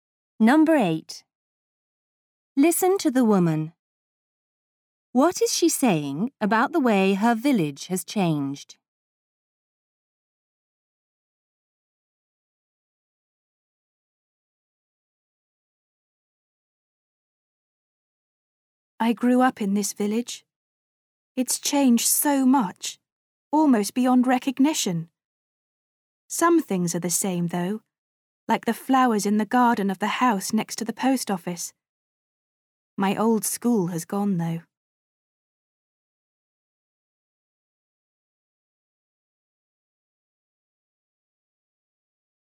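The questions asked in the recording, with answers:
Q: What is she saying about the way her village has changed?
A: It has changed almost beyond recognition, though some things are the same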